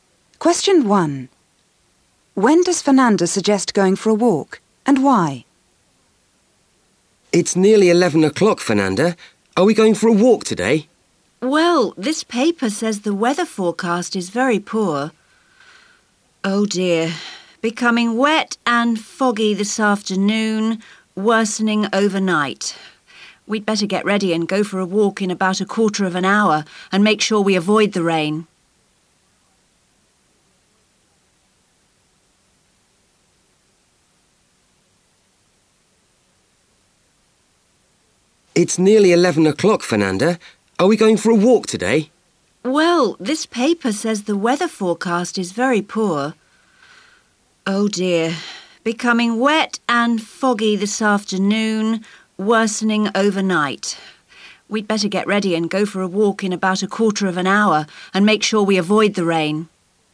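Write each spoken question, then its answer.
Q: When does Fernanda suggest going for a walk, and why?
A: In about a quarter of an hour, to avoid the rain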